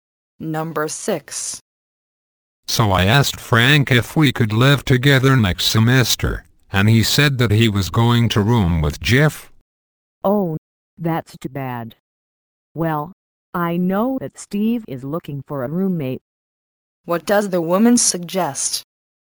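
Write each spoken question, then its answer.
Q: What does the woman suggest?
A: That the man room with Steve.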